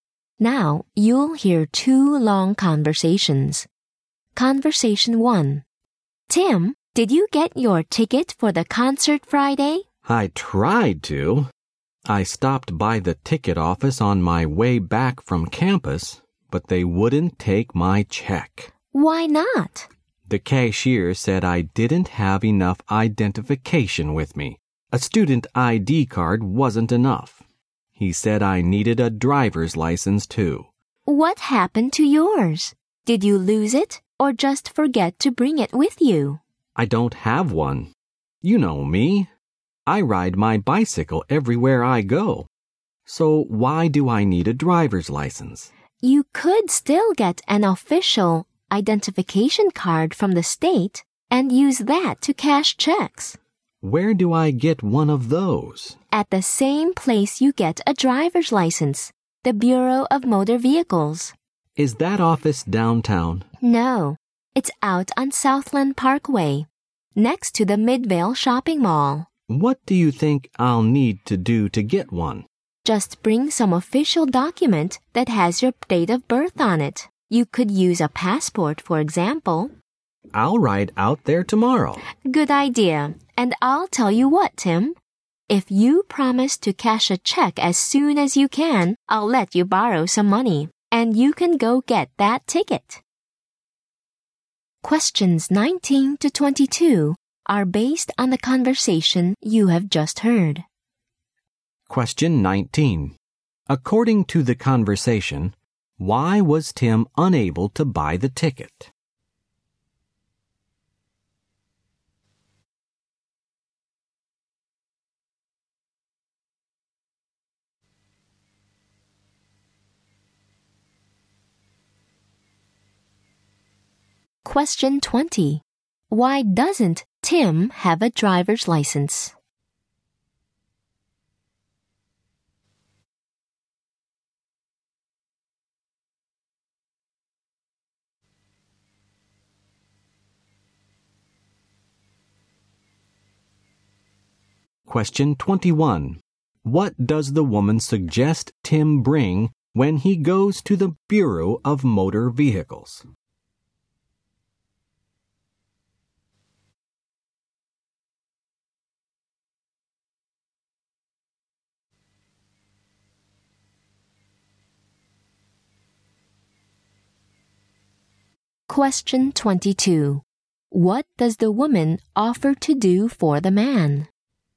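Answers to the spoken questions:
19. He didn't have enough identification to pay by check
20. He rides his bicycle everywhere
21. An official document with his date of birth, such as a passport
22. Lend him money to buy the ticket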